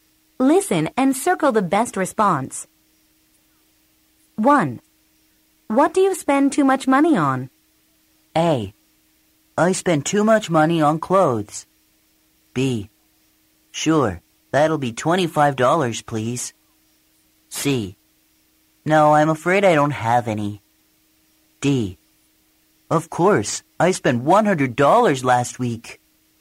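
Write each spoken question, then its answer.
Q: What do you spend too much money on?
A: A: I spend too much money on clothes.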